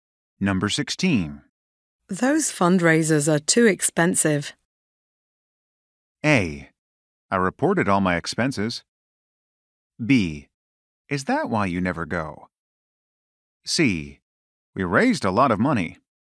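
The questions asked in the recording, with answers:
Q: Those fundraisers are too expensive.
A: B: Is that why you never go?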